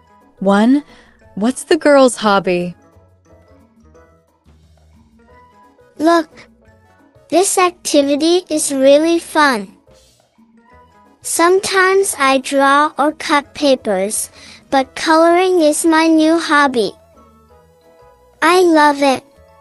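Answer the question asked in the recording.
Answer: coloring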